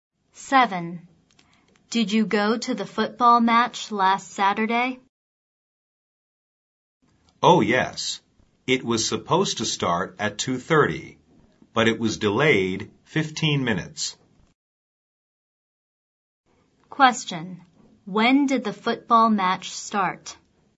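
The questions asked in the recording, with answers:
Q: When did the football match start?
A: At 2:45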